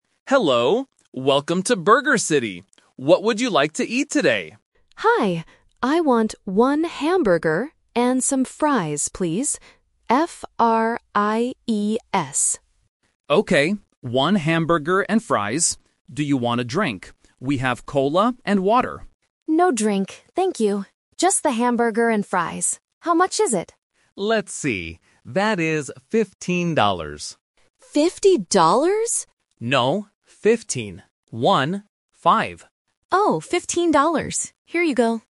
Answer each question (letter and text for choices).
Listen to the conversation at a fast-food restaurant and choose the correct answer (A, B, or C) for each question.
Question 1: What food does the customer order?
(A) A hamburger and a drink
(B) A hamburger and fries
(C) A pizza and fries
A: (B) A hamburger and fries

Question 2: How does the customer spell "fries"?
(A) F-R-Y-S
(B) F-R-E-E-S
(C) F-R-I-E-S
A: (C) F-R-I-E-S

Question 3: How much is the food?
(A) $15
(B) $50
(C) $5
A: (A) $15

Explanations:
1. The customer clearly says, "I want one hamburger and some fries, please." Option (A) A hamburger and a drink is The Trap: the cashier asks if she wants a drink, but she says "No drink, thank you." Option (C) A pizza and fries is not mentioned.
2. The customer spells the word for the food she wants clearly: "F-R-I-E-S". Options (A) and (B) are incorrect spellings with similar sounds.
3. The cashier says the total is "fifteen dollars" and confirms it by saying "One, five." Option (B) $50 is The Trap: the customer mishears and says "Fifty dollars?!", but the cashier corrects her. Option (C) $5 is a distractor with a similar starting sound.

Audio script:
Cashier: Hello! Welcome to Burger City. What would you like to eat today?
Customer: Hi. I want one hamburger and some fries, please. F-R-I-E-S.
Cashier: Okay. One hamburger and fries. Do you want a drink? We have cola and water.
Customer: No drink, thank you. Just the hamburger and fries. How much is it?
Cashier: Let's see... That is fifteen dollars.

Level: A1